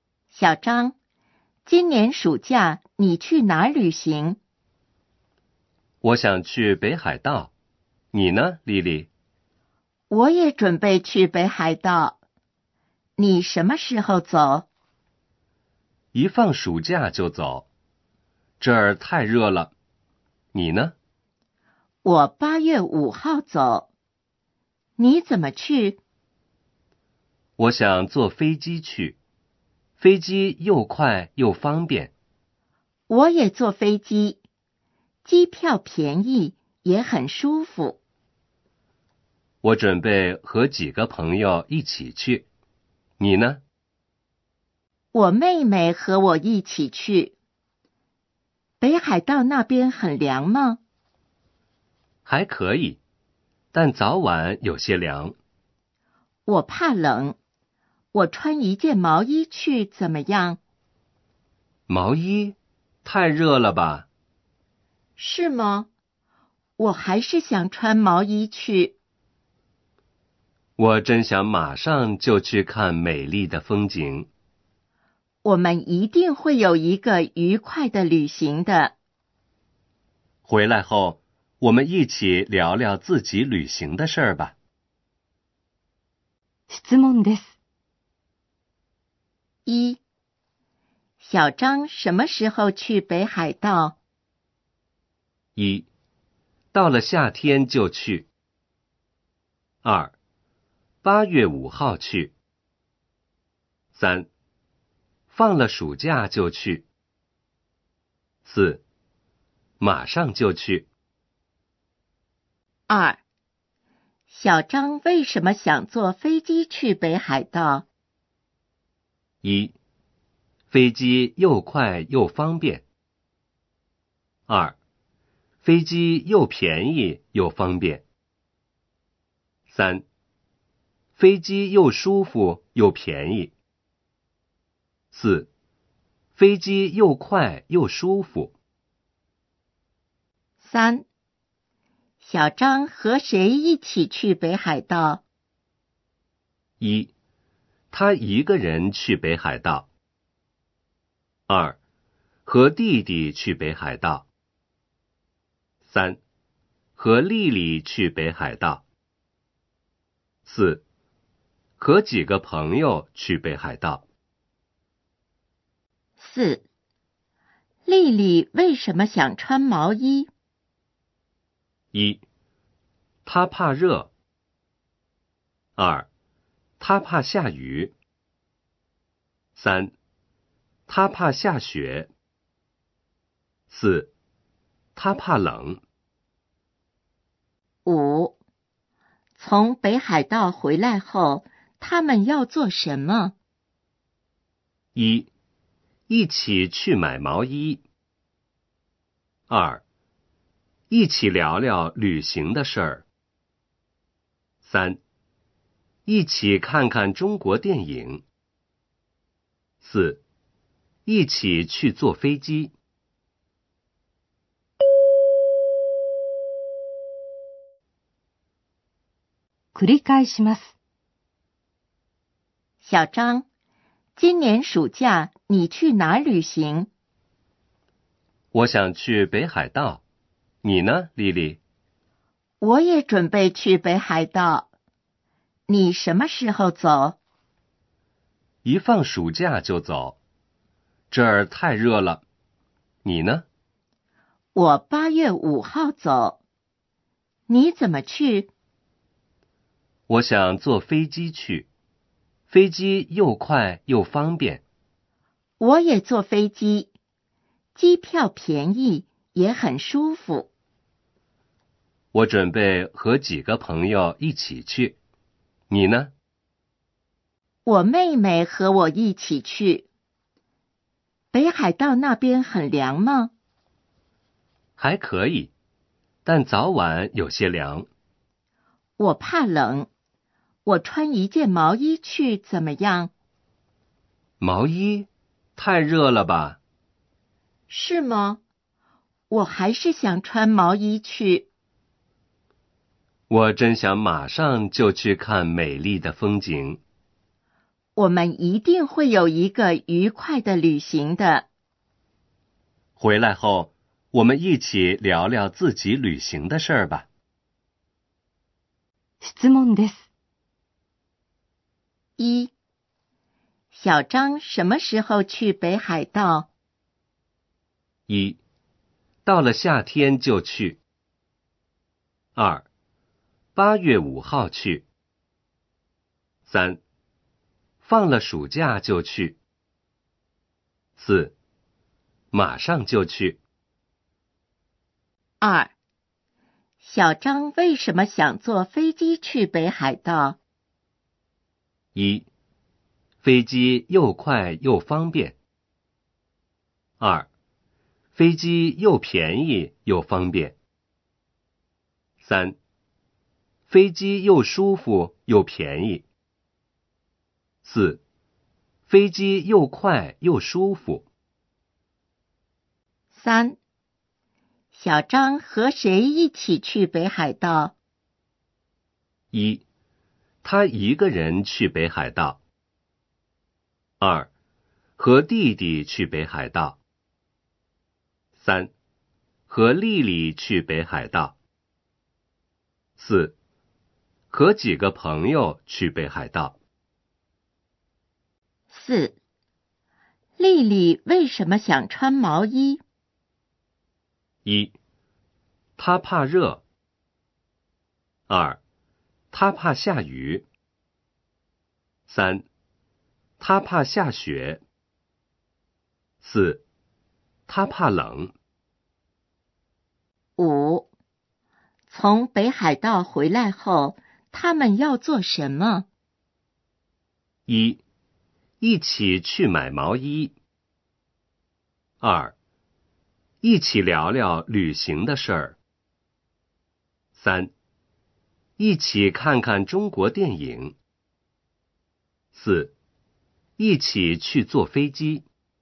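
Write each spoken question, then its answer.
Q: 小张什么时候去北海道?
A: 3: 放了暑假就去。

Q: 小张为什么想坐飞机去北海道?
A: 1: 飞机又快又方便。

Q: 小张和谁一起去北海道?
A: 4: 和几个朋友去北海道。

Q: 丽丽为什么想穿毛衣?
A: 4: 她怕冷。

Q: 从北海道回来后,他们要做什么?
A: 2: 一起聊聊旅行的事儿。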